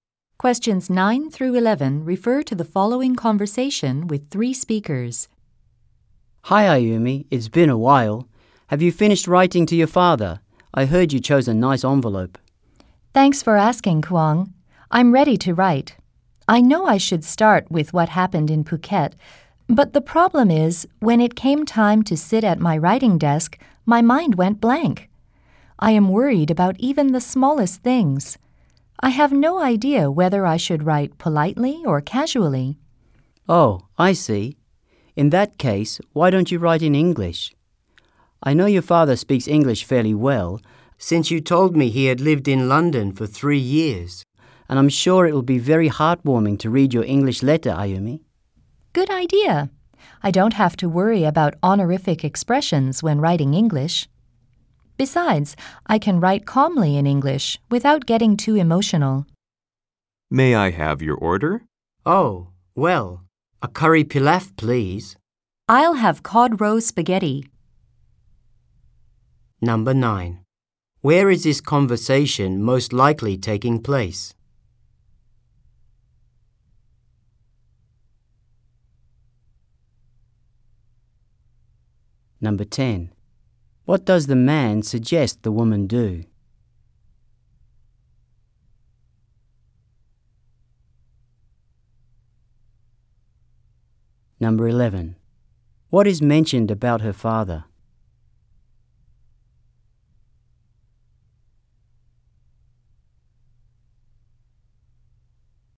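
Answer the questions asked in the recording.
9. At a restaurant
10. Write the letter in English
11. He lived in London for 3 years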